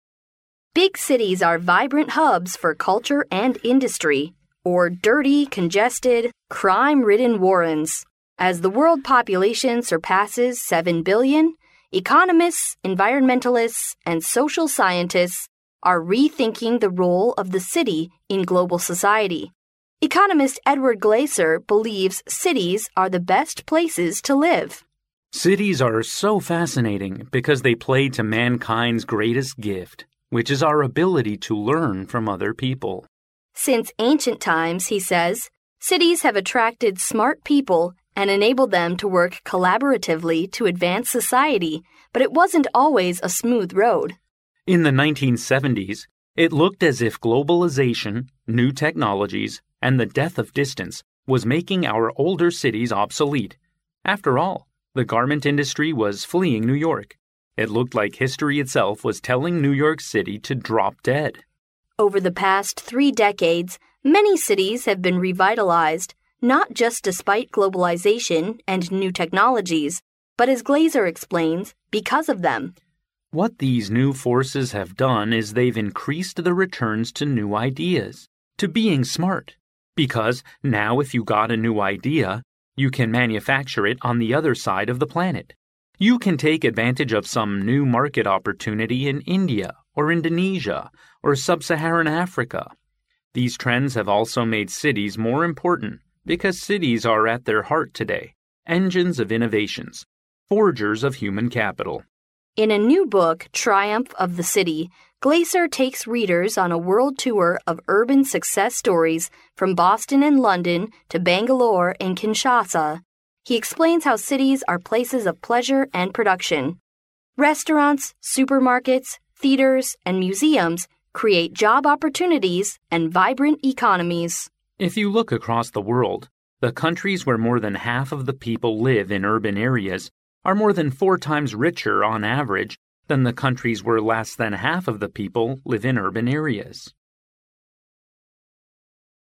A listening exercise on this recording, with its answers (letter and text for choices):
Conversation Two Listen to the conversation, and choose the answer according to what you hear.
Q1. What did globalization bring to older cities, such as New York, in 1970s?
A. New technologies and prosperity.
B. The rising of garment industry.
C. Reductions in population.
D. A severe depression.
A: D. A severe depression.

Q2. What is the current role of cities in the world?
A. Cities are more and more important.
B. They are less important than before.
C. People believe cities are always the heart of manufacturing.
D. There are advantages in cities in market opportunities.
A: A. Cities are more and more important.

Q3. What is the main focus of Glaeser's book Triumph of the City?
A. Techniques of looking for jobs in cities.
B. His legend in travelling around the world.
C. Pleasure and prospects of living in cities.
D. Comparisons between living in cities and countryside.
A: C. Pleasure and prospects of living in cities.

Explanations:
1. 由录音中"In the 1970s, it looked as if globalization...was making our older cities obsolete."可知,在1970s全球化使老城市衰退,因此选D项。
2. 根据录音中"These trends have also made cities more important"可知,城市更加重要了,因此选A项。
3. 录音中提到在Triumph of the City中"He explains how cities are places of pleasure and production."由此可知Glaeser在书中主要讲了城市的乐趣和生产力。因此选C项。

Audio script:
[听力原文] Faiza: Big cities are vibrant hubs for culture and industry, or dirty, congested, crime-ridden warrens. As the world population surpasses seven billion, economists, environmentalists and social scientists are rethinking the role of the city in global society. Economist Edward Glaeser believes cities are the best places to live. Glaeser: Cities are so fascinating because they play to mankind's greatest gift, which is our ability to learn from other people. Faiza: Since ancient times, he says, cities have attracted smart people and enabled them to work collaboratively to advance society. But it wasn't always a smooth road. Glaeser: In the 1970s, it looked as if globalization, new technologies and the death of distance was making our older cities obsolete. After all, the garment industry was fleeing New York. It looked like history itself was telling New York City to drop dead. Faiza: Over the past three decades many cities have been revitalized, not just despite globalization and new technologies, but, as Glaeser explains, because of them. Glaeser: What these new forces have done is they've increased the returns to new ideas, to being smart. Because, now if you got a new idea, you can manufacture it on the other side of the planet. You can take advantage of some new market opportunity in India or Indonesia or Sub-Saharan Africa. These trends have also made cities more important because cities are at their heart today, engines of innovations, forgers of human capital. Faiza: In a new book, "Triumph of the City, "Glaeser takes readers on a world tour of urban success stories from Boston and London, to Bangalore and Kinshasa. He explains how cities are places of pleasure and production. Restaurants, supermarkets, theaters and museums create job opportunities and vibrant economies. Glaeser: If you look across the world, the countries where more than half of the people live in urban areas are more than four times richer, on average, than the countries where less than half of the people live in urban areas.